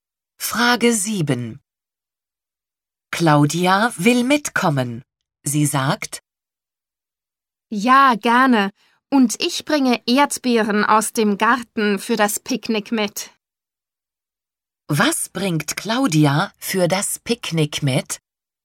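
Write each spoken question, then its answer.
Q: Was bringt Claudia für das Picknick mit?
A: Erdbeeren aus dem Garten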